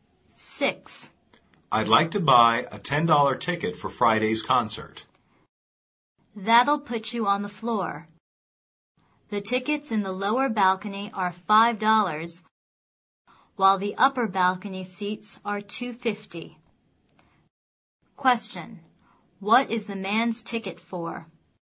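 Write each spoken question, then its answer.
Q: What is the man's ticket for?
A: A $10 seat on the floor for Friday's concert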